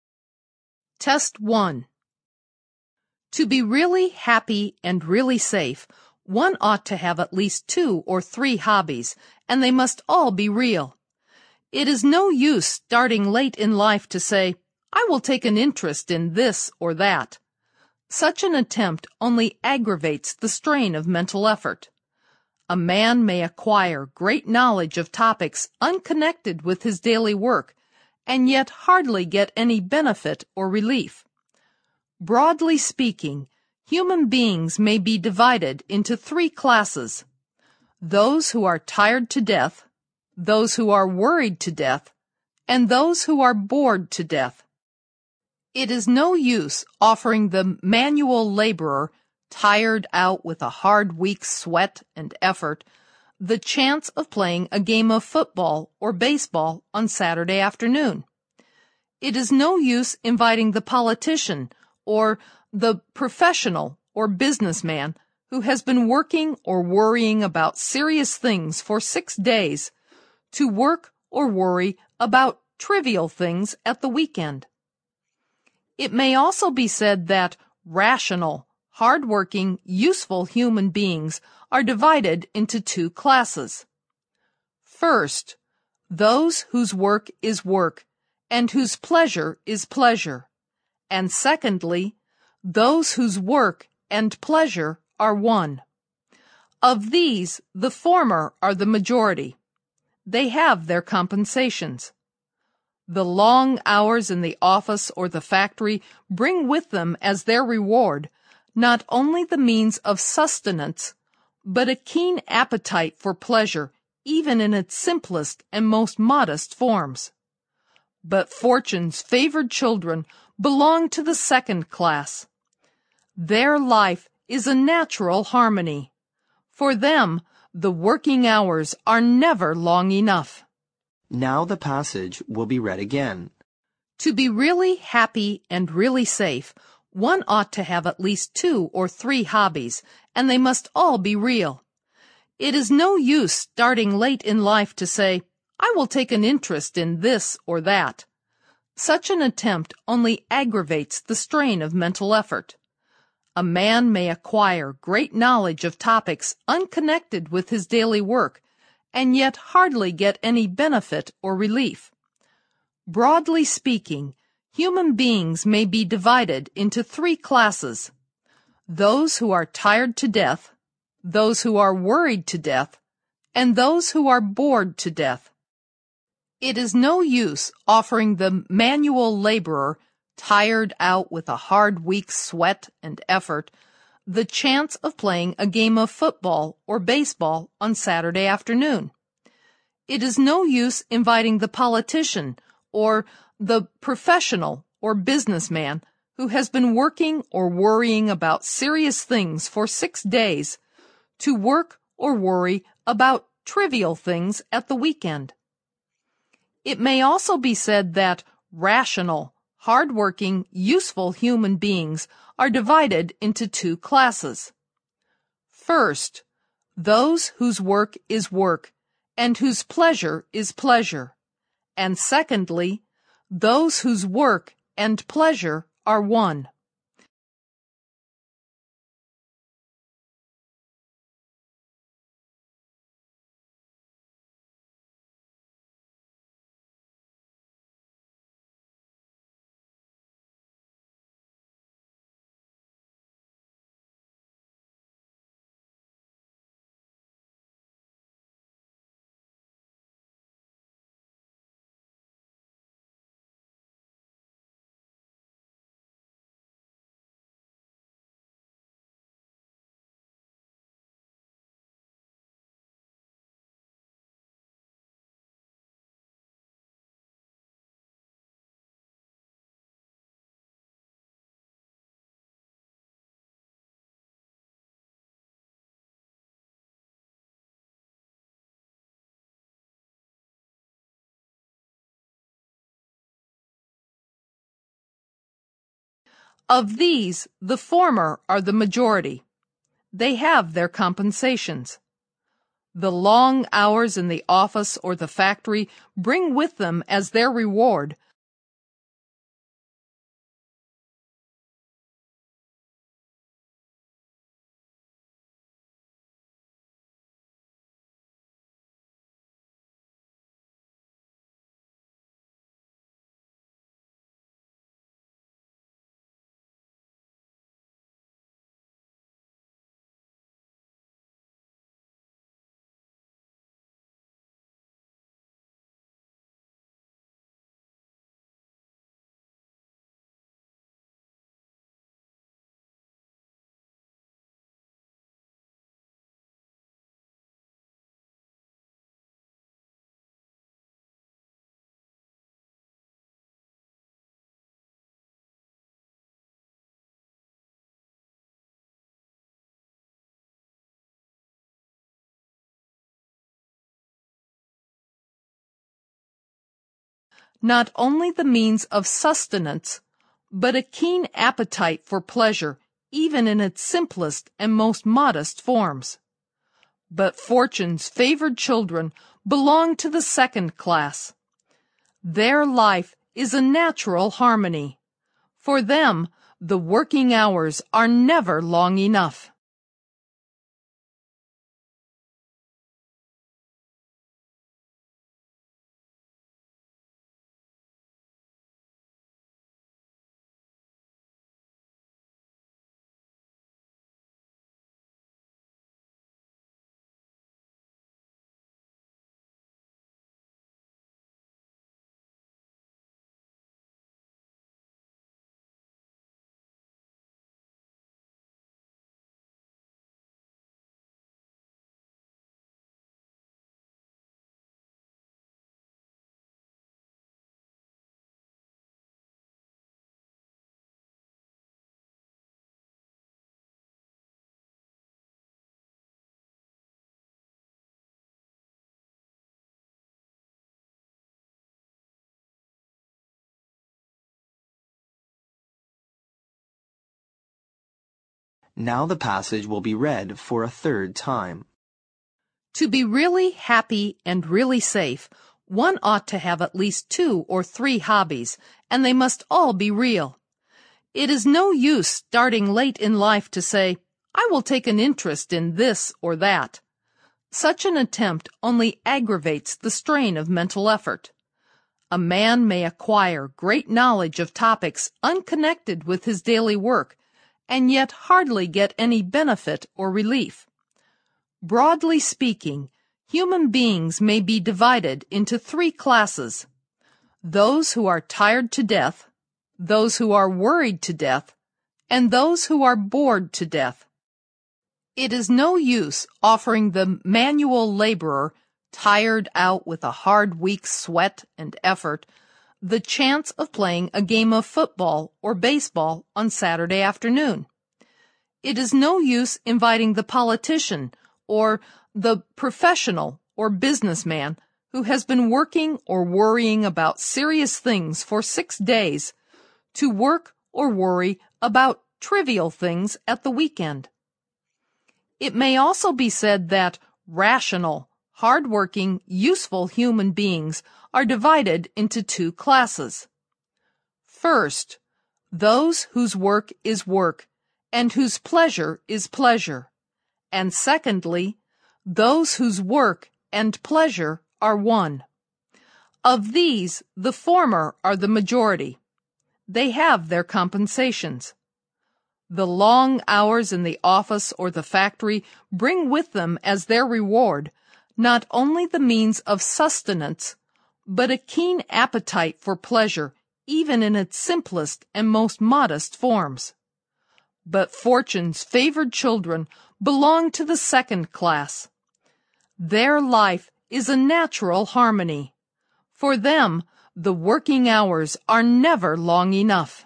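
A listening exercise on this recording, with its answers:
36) Such an attempt only (36) ______ the strain of mental effort.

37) A man may (37) ______ great knowledge of topics unconnected with his daily work, and yet hardly get any benefit or (38) ______ .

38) A man may (37) ______ great knowledge of topics unconnected with his daily work, and yet hardly get any benefit or (38) ______ .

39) It is no use offering the (39) ______ labourer, tired out with a hard week's (40) ______ and effort, the chance of playing a game of football or baseball on Saturday afternoon.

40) It is no use offering the (39) ______ labourer, tired out with a hard week's (40) ______ and effort, the chance of playing a game of football or baseball on Saturday afternoon.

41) It is no use inviting the politician or the (41) ______ or business man, who has been working or worrying about serious things for six days, to work or worry about (42) ______ things at the weekend.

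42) It is no use inviting the politician or the (41) ______ or business man, who has been working or worrying about serious things for six days, to work or worry about (42) ______ things at the weekend.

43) It may also be said that (43) ______ , hard-working, useful human beings are divided into two classes:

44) (44) ____________________________________________________ .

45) (45) ___________________________________________ , not only the means of sustenance (生计), but a keen appetite for pleasure even in its simplest and most modest forms.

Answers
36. aggravates
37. acquire
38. relief
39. manual
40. sweat
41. professional
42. trivial
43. rational
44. first, those whose work is work and whose pleasure is pleasure, and secondly, those whose work and pleasure are one
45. The long hours in the office or the factory bring with them as their reward

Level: 六级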